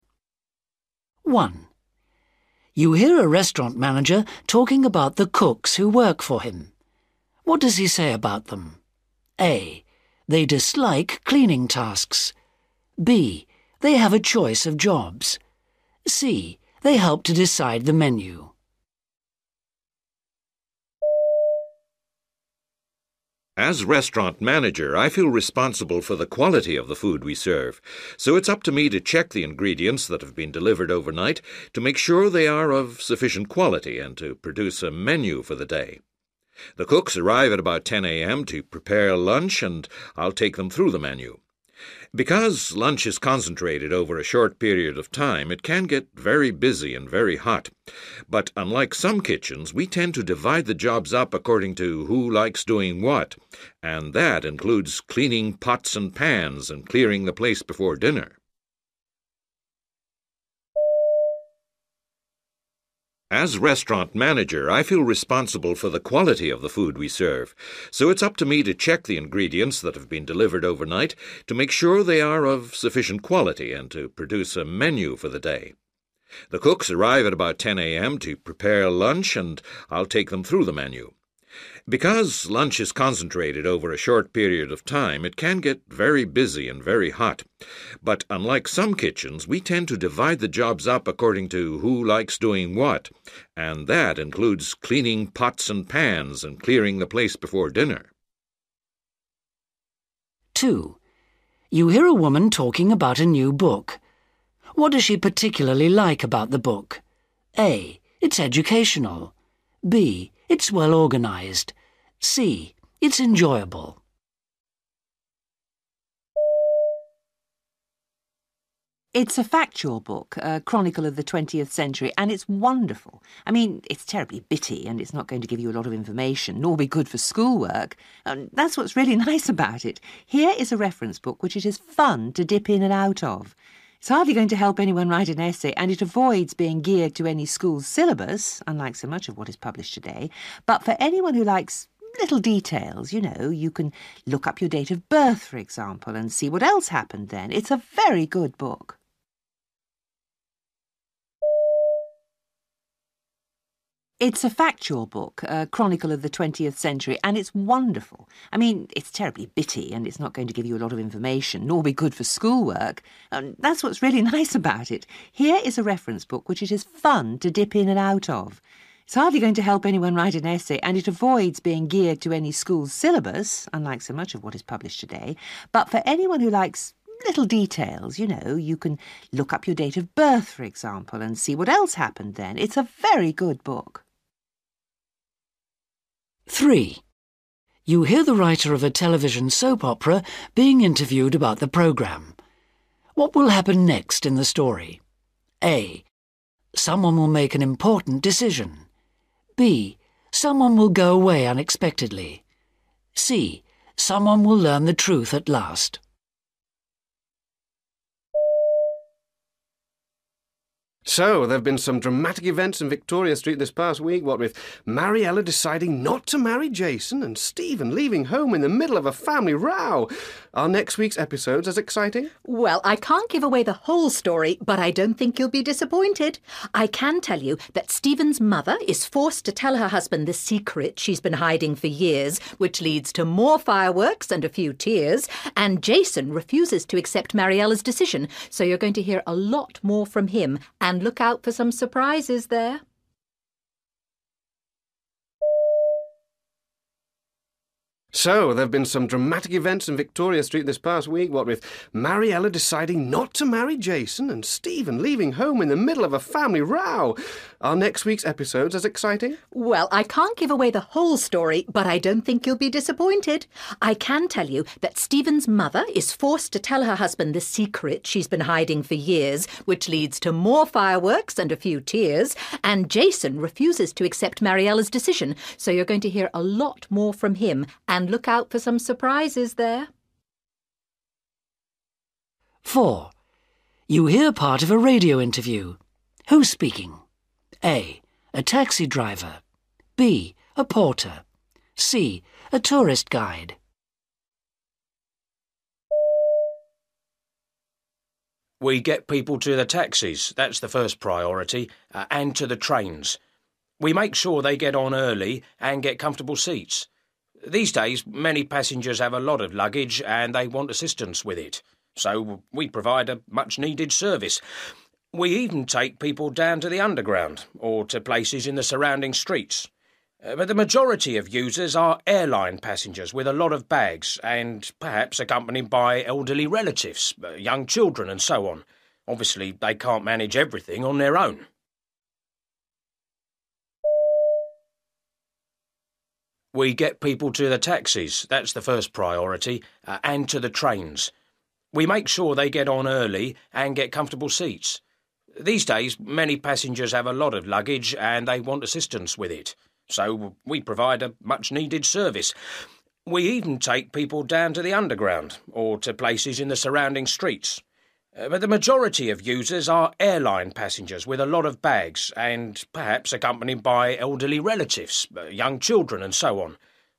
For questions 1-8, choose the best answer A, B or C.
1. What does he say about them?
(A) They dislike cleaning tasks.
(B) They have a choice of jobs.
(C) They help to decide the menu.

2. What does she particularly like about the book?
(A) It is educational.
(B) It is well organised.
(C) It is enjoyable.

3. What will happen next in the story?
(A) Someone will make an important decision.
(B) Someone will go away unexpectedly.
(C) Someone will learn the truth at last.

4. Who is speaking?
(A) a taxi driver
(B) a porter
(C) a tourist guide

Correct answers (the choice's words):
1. They have a choice of jobs.
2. It is enjoyable.
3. Someone will learn the truth at last.
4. a porter

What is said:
1 You hear a restaurant manager talking about the cooks who work for him.
A They dislike cleaning tasks.
B They have a choice of jobs.
C They help to decide the menu.
As restaurant manager, I feel responsible for the quality of the food we serve. So it's up to me to check the ingredients that have been delivered overnight to make sure they are of sufficient quality, and to produce a menu for the day. The cooks arrive at about ten a.m. to prepare lunch and I'll take them through the menu. Because lunch is concentrated over a short period of time it can get very busy and very hot. But unlike some kitchens, we tend to divide the jobs up according to who likes doing what, and that includes cleaning pots and pans and clearing the place before dinner.
2
It's a factual book, a chronicle of the twentieth century and it's wonderful. I mean it's terribly bitty and it's not going to give you a lot of information nor be good for school work. That's what's really nice about it. Here is a reference book which it is fun to dip in and out of. It's hardly going to help anyone write an essay and it avoids being geared to any school syllabus, unlike so much of what is published today. But for anyone who likes little details, you know, you can look up your date of birth, for example, and see what else happened then, it's a very good book.
3
Man: So, there've been some dramatic events in Victoria Street this past week, what with Mariela deciding not to marry Jason, and Stephen leaving home in the middle of a family row. Are next week's episodes as exciting?
Woman: Well, I can't give away the whole story, but I don't think you'll be disappointed! I can tell you that Stephen's mother is forced to tell her husband the secret she's been hiding for years, which leads to more fireworks and a few tears. And Jason refuses to accept Mariela's decision, so you're going to hear a lot more from him, and look out for some surprises there.
4
We get people to the taxis, that's the first priority, and to the trains. We make sure they get on early and get comfortable seats. These days many passengers have a lot of luggage and they want assistance with it. So we provide a much-needed service. We even take people down to the Underground or to places in the surrounding streets. But the majority of users are airline passengers with a lot of bags and perhaps accompanied by elderly relatives, young children and so on. Obviously they can't manage everything on their own.
5